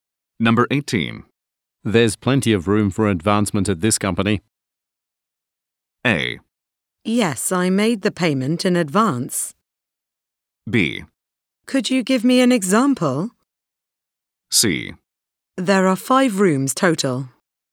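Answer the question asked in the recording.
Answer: B: Could you give me an example?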